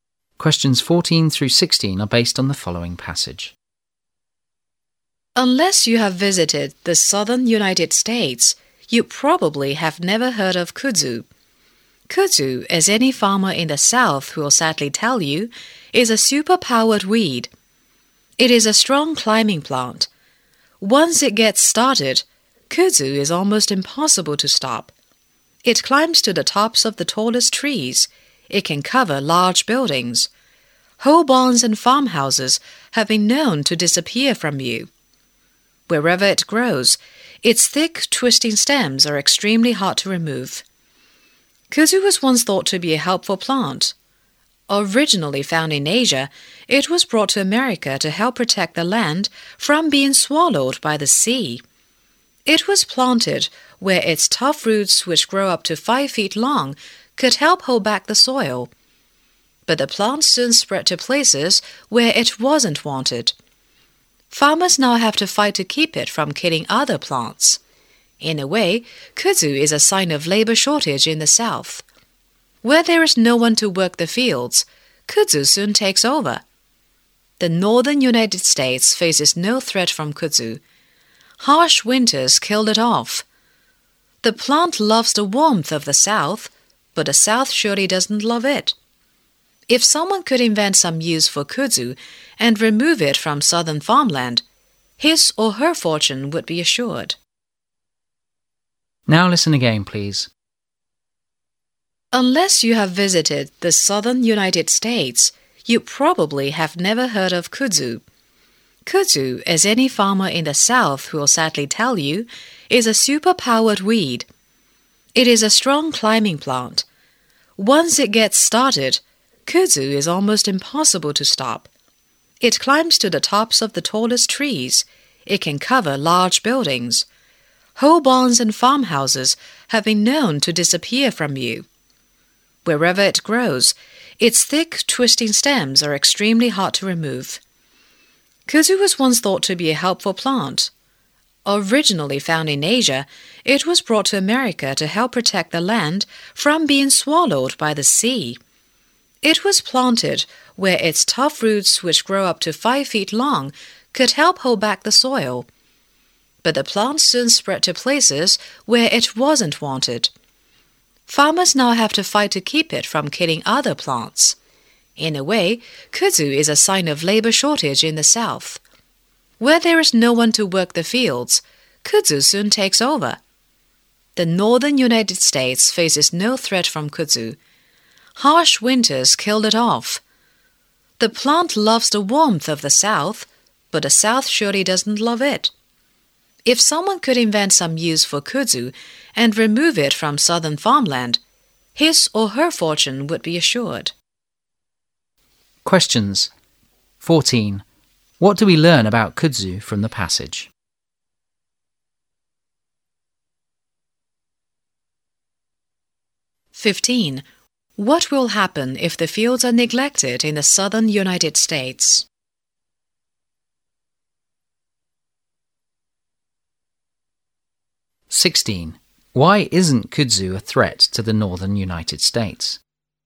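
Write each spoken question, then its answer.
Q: What will happen if the fields are neglected in the southern United States?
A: Kudzu will take over

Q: Why isn't kudzu a threat to the northern United States?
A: The harsh winters kill it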